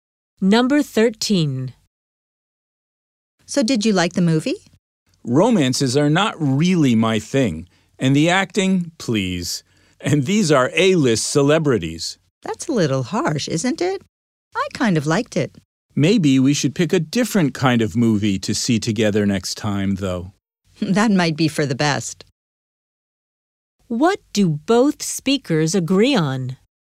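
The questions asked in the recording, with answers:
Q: What do both speakers agree on?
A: They should pick a different kind of movie to see together next time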